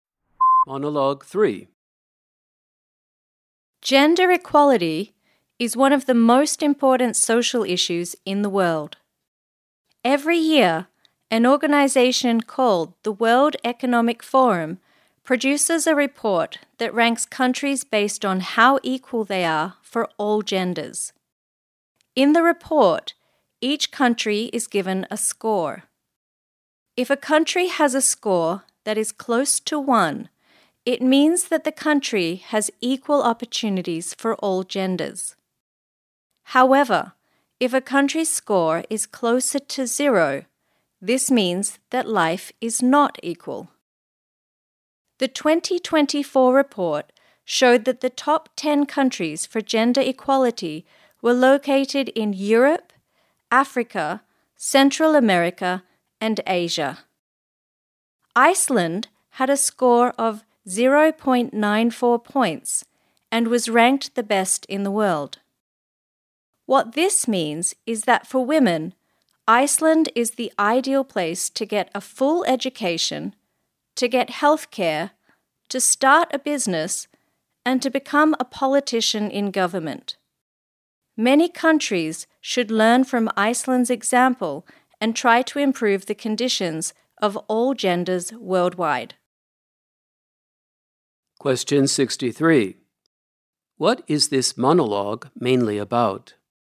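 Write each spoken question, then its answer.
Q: What is this monologue mainly about?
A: A report ranking countries on gender equality (Iceland ranked best)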